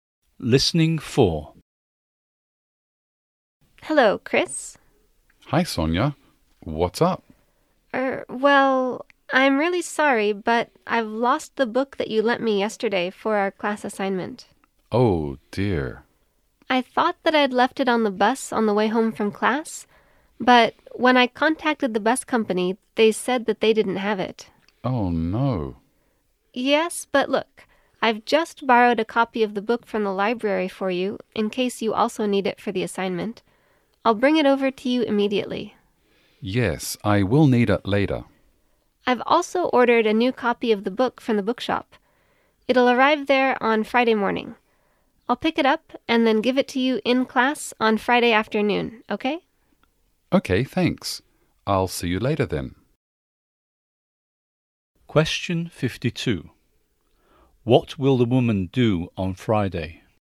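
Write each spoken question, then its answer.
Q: What will the woman do on Friday?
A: Pick up the new copy of the book and give it to him in class.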